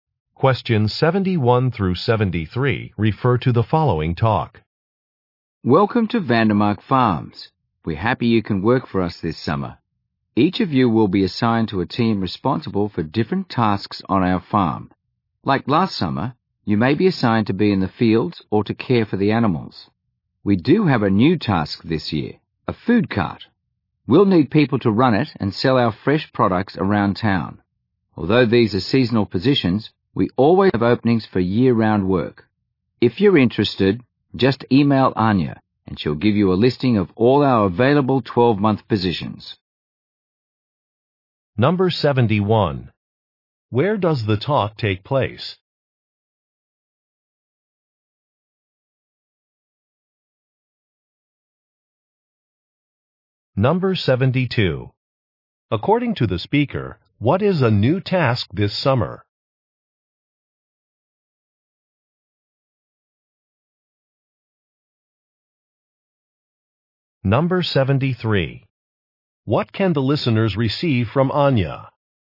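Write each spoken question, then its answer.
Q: Where does the talk take place?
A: On a farm

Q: According to the speaker, what is a new task this summer?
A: Running a food cart

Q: What can the listeners receive from Anya?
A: A list of year-round job openings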